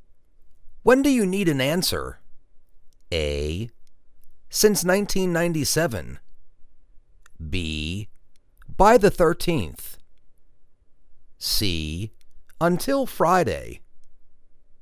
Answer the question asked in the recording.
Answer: By the 13th.